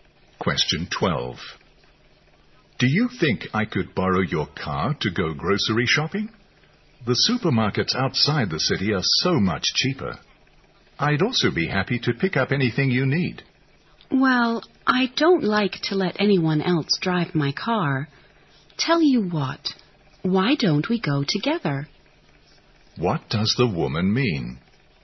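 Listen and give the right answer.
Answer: She won't lend her car, but she'll drive and they can go shopping together.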